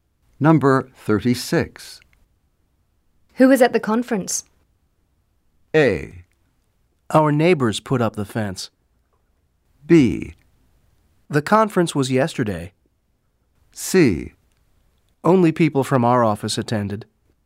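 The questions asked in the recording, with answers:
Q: Who was at the conference?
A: C: Only people from our office attended.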